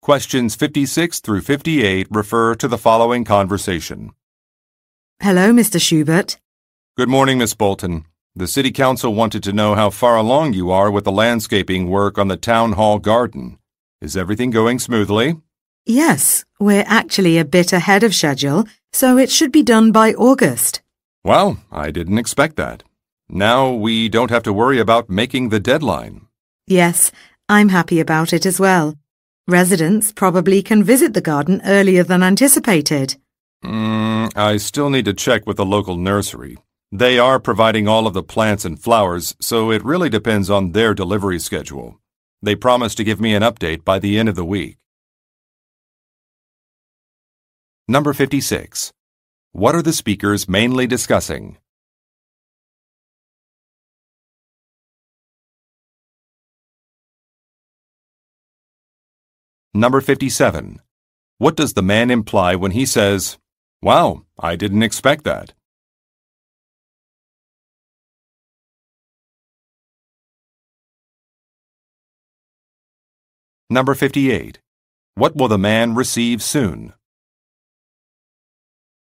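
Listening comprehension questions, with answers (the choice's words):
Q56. What are the speakers mainly discussing?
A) A city election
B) A town hall meeting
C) A budget proposal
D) A landscaping project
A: A landscaping project

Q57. What does the man imply when he says, "Wow, I didn't expect that"?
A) He is unhappy about a change.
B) He is surprised by a request.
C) He is pleased by some news.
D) He is worried about some costs.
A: He is pleased by some news.

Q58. What will the man receive soon?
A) An electronic bill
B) A schedule update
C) An agreement form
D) A product catalog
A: A schedule update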